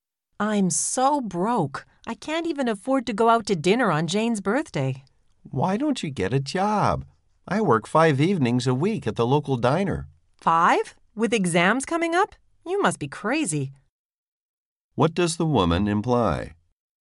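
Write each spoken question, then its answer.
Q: What does the woman imply?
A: Working five evenings with exams coming is unwise.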